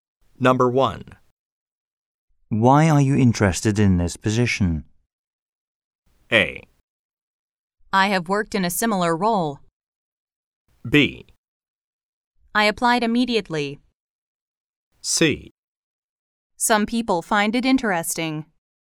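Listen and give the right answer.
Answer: A: I have worked in a similar role.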